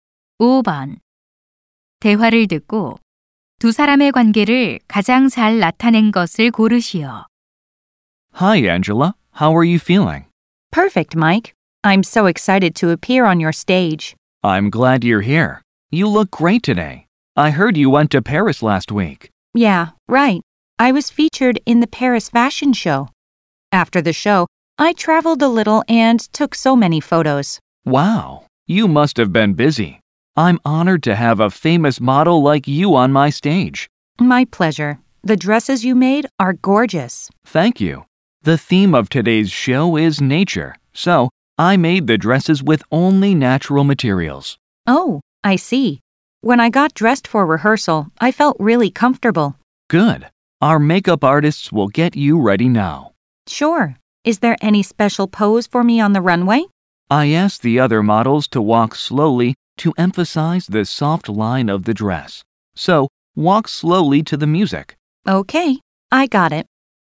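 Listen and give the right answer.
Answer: 패션모델 - 의상 디자이너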